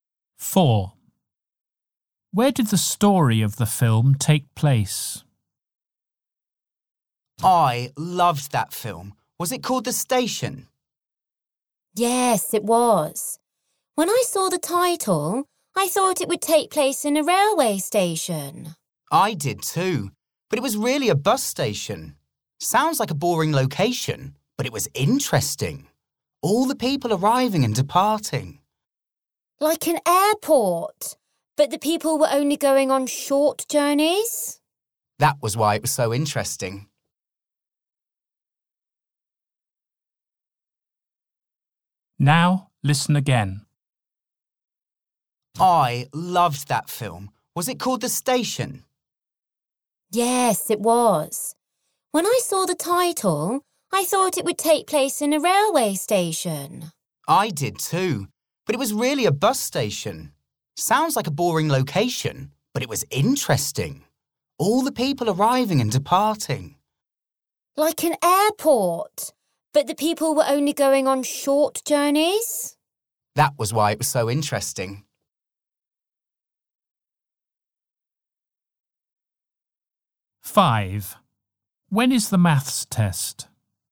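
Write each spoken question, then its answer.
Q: Where did the story of the film take place?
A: In a bus station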